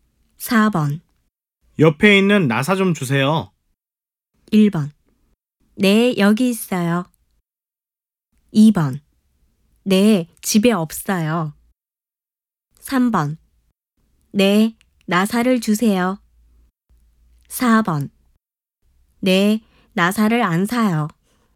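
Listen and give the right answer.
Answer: 1: 네, 여기 있어요.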